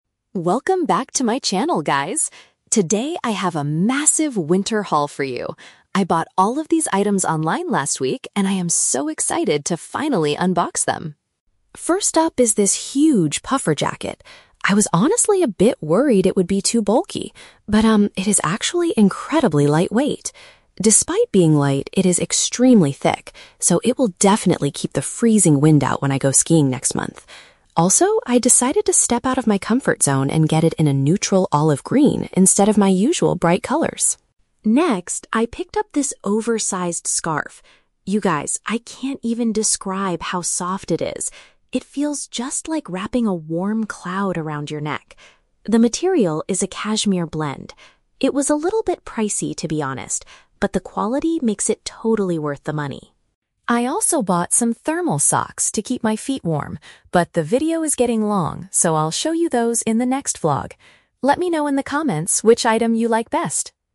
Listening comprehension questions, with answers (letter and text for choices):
Listen to the fashion vlogger's video. For each question, choose the correct answer (A, B, or C).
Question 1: What surprised the vlogger about her new puffer jacket?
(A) It does not weigh as much as she thought it would.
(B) It comes in a very bright and vibrant color.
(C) It is far too thin to wear during her skiing trip.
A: (A) It does not weigh as much as she thought it would.

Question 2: How does the vlogger describe the oversized scarf?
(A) It is made entirely of pure, high-quality sheep wool.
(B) It feels exceptionally smooth and comfortable to wear.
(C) It was surprisingly cheap and highly affordable.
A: (B) It feels exceptionally smooth and comfortable to wear.

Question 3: What will the vlogger do in her following video?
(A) Take her viewers on a skiing trip in the mountains.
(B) Give styling tips for a neutral-colored winter coat.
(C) Present the special winter socks she purchased.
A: (C) Present the special winter socks she purchased.

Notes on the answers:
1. The vlogger states that she was worried the jacket would be "bulky" (heavy/big), but she was surprised that it is "incredibly lightweight" (does not weigh much). Option B is a trap because she bought a "neutral olive green" jacket instead of her usual "bright colors." Option C is a trap because she says the jacket is "extremely thick," not thin.
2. The vlogger says she can't describe "how soft it is" and that it feels like "wrapping a warm cloud around your neck." This is paraphrased as "exceptionally smooth and comfortable." Option A is a trap; she says it is a "cashmere blend," not 100% sheep wool. Option C is the opposite of the truth; she admits the scarf was "a little bit pricey" (expensive), not cheap.
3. At the end of the video, she mentions she bought some "thermal socks" and promises to "show you those in the next vlog." Option A is a trap; she mentions "skiing next month," but that is where she will wear the jacket, not the topic of her next video. Option B is plausible for a fashion vlog but is never mentioned.

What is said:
Vlogger: Welcome back to my channel, guys! Today, I have a massive winter haul for you. I bought all of these items online last week, and I am so excited to finally unbox them.
First up is this huge puffer jacket. I was honestly a bit worried it would be too bulky, but um, it is actually incredibly lightweight! Despite being light, it is extremely thick, so it will definitely keep the freezing wind out when I go skiing next month. Also, I decided to step out of my comfort zone and get it in a neutral olive green instead of my usual bright colors.
Next, I picked up this oversized scarf. You guys, I can't even describe how soft it is! It feels just like wrapping a warm cloud around your neck. The material is a cashmere blend. It was a little bit pricey, to be honest, but the quality makes it totally worth the money.
I also bought some thermal socks to keep my feet warm, but the video is getting long, so I'll show you those in the next vlog. Let me know in the comments which item you like best!